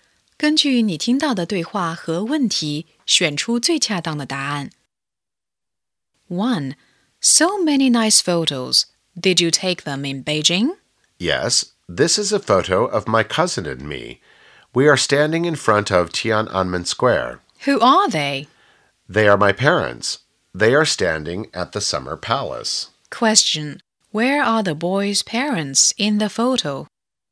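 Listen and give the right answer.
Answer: At the Summer Palace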